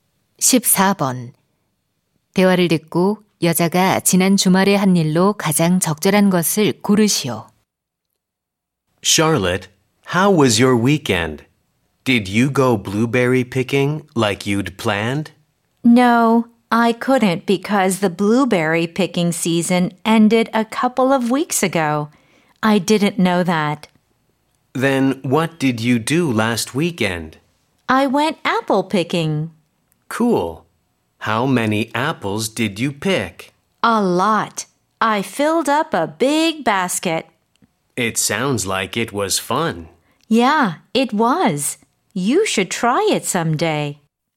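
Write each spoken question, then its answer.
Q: 대화를 듣고 여자가 지난 주말에 한 일로 가장 적절한 것을 고르시오.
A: 사과 따기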